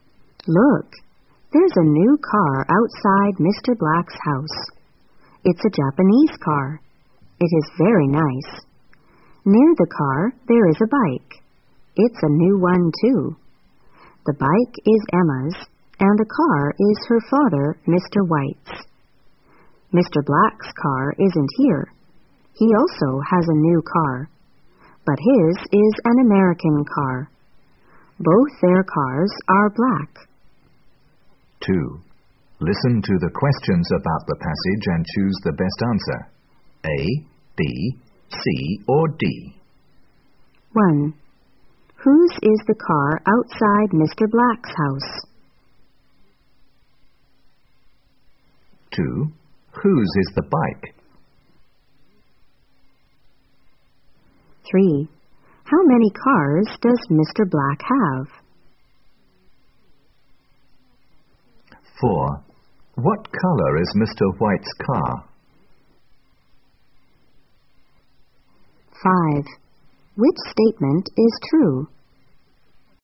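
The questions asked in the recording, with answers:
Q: Whose is the car outside Mr. Black's house?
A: Mr. White's

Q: Whose is the bike?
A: Emma's

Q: How many cars does Mr. Black have?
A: One

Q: What color is Mr. White's car?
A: Black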